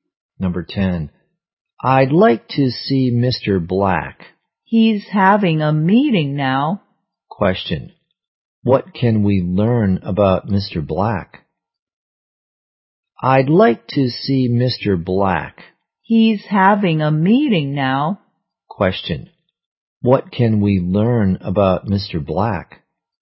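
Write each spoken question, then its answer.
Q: What can we learn about Mr.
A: He is having a meeting now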